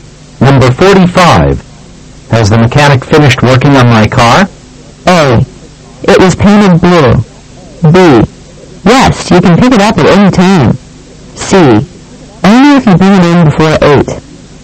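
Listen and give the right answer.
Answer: B: Yes, you can pick it up at any time.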